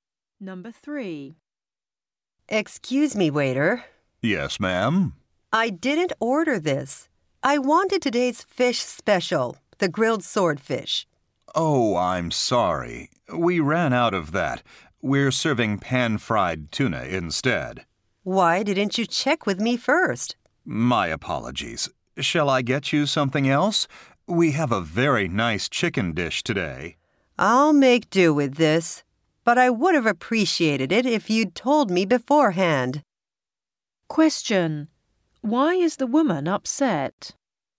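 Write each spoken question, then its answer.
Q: Why is the woman upset?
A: She was served a different dish without being told first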